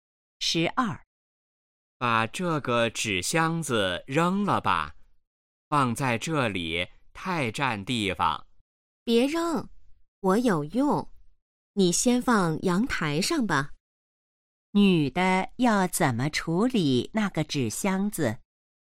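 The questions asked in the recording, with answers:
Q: 女的要怎么处理那个纸箱子?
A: 放到阳台上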